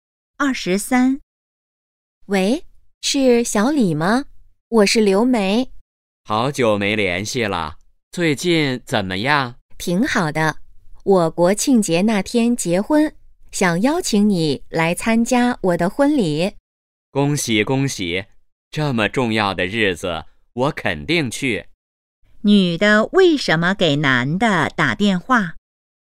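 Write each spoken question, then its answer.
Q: 女的为什么给男的打电话?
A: 邀请他参加婚礼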